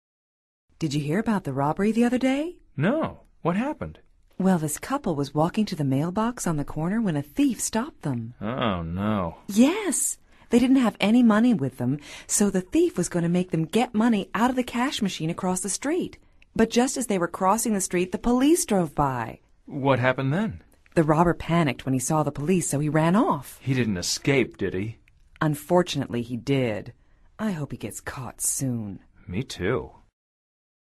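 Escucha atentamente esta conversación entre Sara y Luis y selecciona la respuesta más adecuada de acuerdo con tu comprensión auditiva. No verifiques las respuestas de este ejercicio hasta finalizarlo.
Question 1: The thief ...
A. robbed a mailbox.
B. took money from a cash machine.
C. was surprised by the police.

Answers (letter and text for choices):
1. C. was surprised by the police.

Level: Nivel Avanzado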